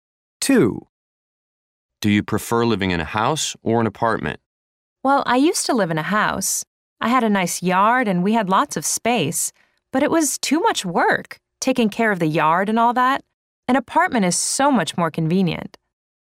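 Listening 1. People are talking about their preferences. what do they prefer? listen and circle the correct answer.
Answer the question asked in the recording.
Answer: an apartment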